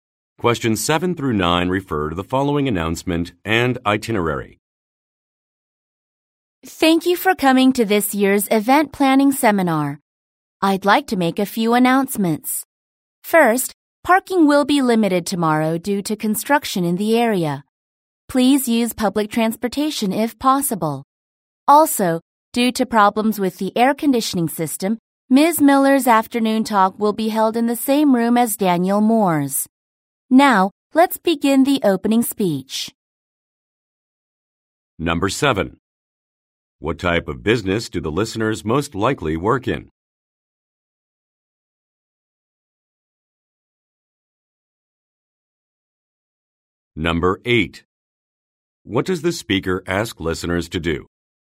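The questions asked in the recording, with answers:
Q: What type of business do the listeners most likely work in?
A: Event planning

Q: What does the speaker ask listeners to do?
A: Use public transportation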